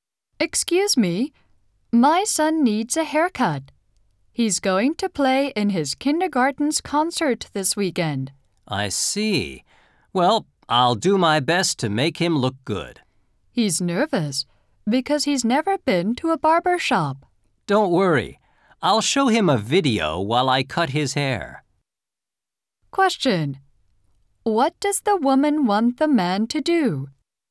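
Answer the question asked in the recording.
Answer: Cut her son's hair.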